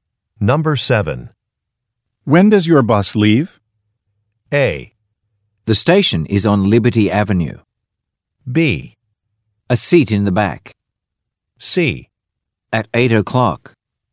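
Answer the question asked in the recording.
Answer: C: At 8 o'clock.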